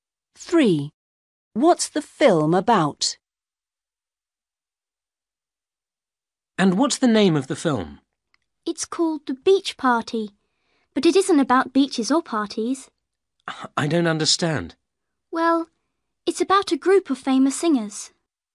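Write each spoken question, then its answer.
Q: What's the film about?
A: a group of famous singers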